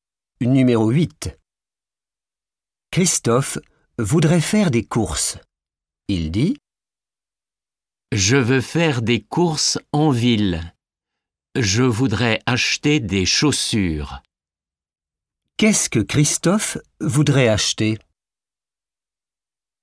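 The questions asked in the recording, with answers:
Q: Qu'est-ce que Christophe voudrait acheter ?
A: des chaussures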